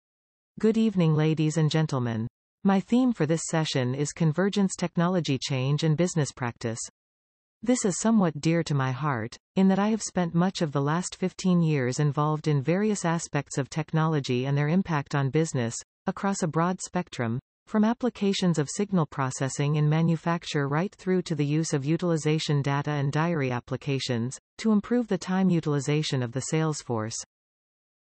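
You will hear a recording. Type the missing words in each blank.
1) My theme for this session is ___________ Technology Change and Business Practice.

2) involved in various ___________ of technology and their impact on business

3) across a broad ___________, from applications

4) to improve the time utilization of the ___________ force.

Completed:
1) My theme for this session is convergence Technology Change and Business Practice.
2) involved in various aspects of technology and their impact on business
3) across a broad spectrum, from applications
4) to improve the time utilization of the sales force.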